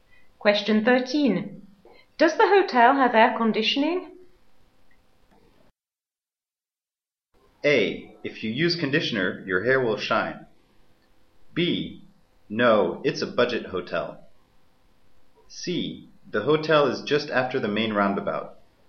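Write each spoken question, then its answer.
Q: Does the hotel have air conditioning?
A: B: No, it's a budget hotel.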